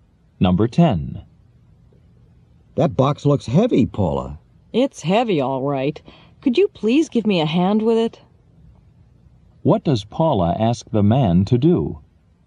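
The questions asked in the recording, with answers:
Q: What does Paula ask the man to do?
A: Help her with the heavy box.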